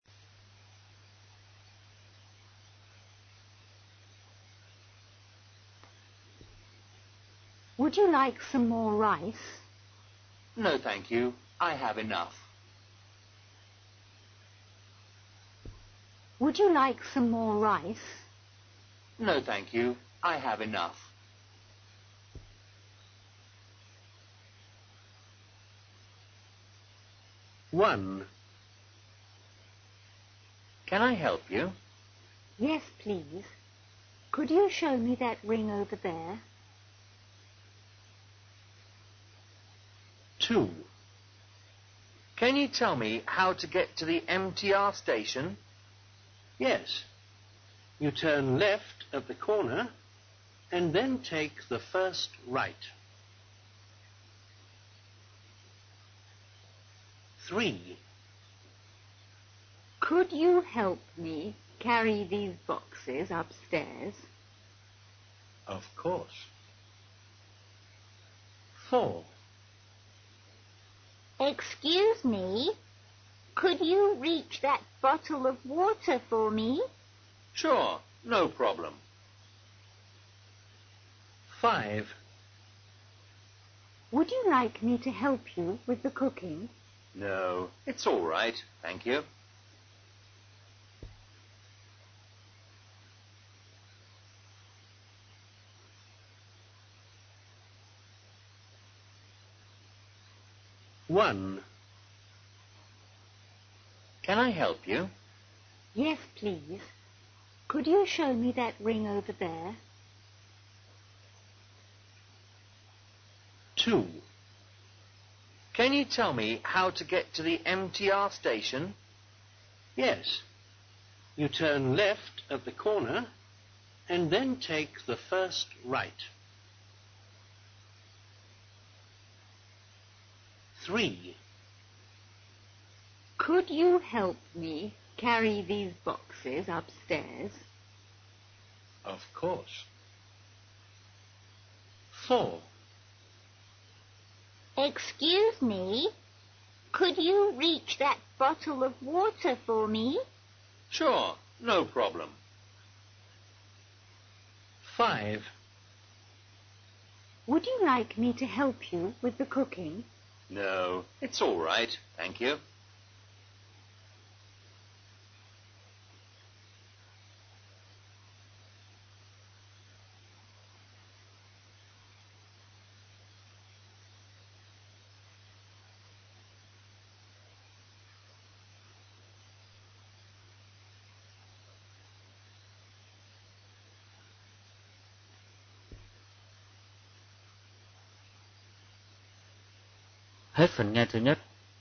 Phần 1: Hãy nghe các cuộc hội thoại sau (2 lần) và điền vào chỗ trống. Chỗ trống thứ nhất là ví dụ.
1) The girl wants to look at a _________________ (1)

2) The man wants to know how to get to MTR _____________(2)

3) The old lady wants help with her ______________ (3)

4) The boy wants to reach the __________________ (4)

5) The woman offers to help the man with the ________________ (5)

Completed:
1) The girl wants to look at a ring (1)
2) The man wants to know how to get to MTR station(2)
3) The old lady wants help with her boxes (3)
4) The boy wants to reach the bottle of water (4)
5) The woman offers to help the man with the cooking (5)